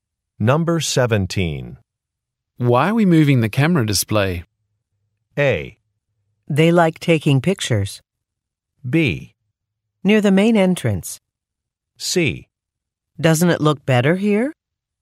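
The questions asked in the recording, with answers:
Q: Why are we moving the camera display?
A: C: Doesn't it look better here?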